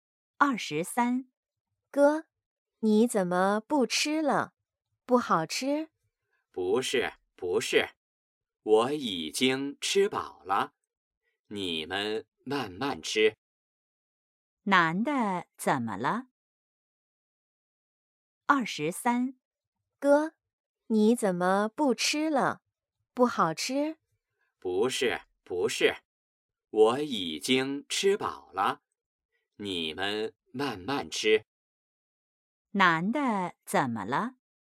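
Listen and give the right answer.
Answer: 吃饱了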